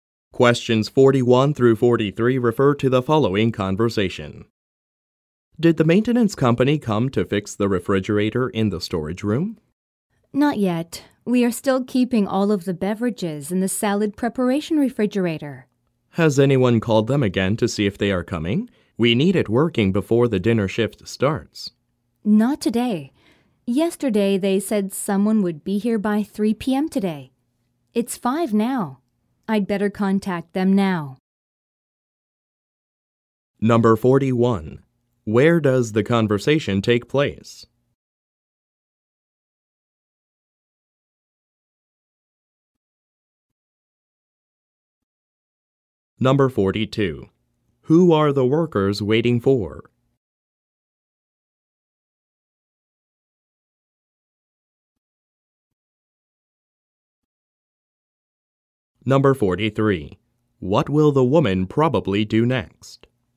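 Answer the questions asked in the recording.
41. At a restaurant
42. The maintenance company (to fix the refrigerator)
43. Call the maintenance company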